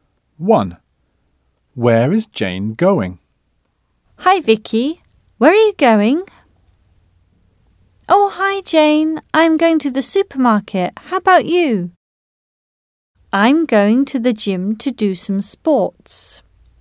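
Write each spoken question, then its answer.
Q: Where is Jane going?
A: To the gym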